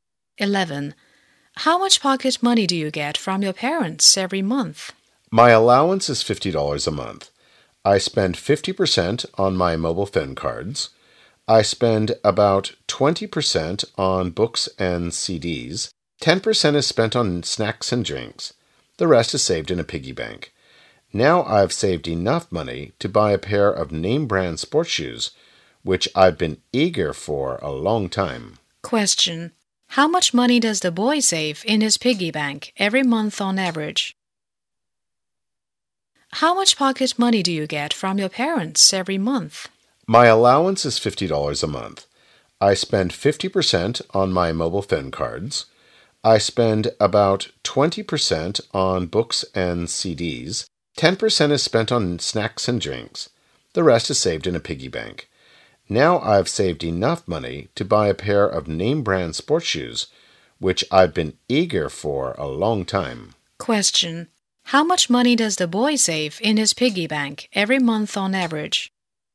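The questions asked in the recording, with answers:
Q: How much money does the boy save in his piggy bank every month on average?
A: $10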